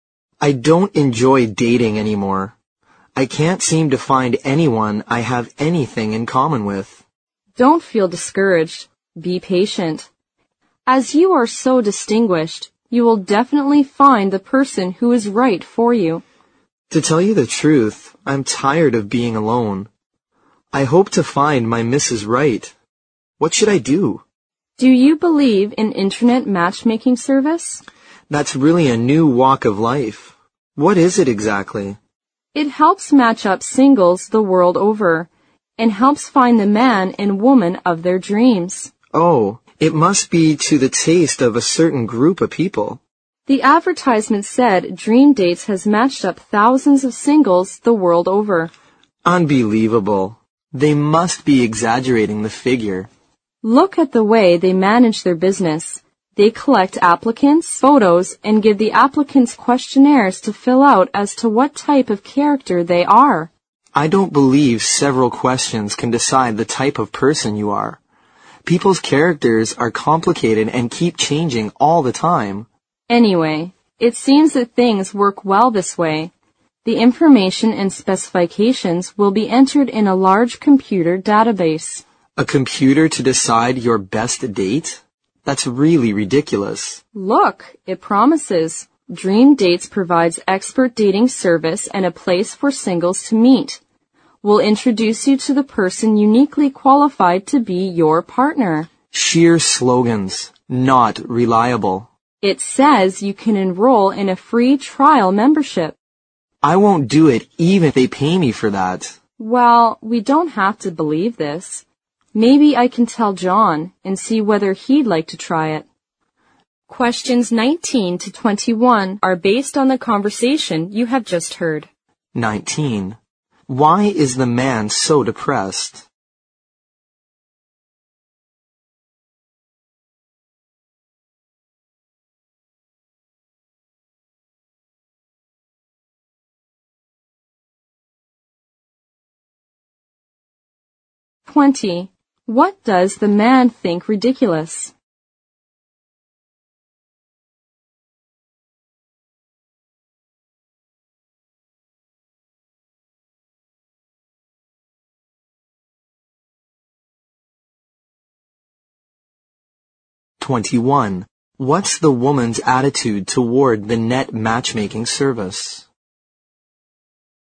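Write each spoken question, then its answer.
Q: Why is the man so depressed?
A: He can't find anyone he has anything in common with and is tired of being alone.

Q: What does the man think ridiculous?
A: Letting a computer decide his best date.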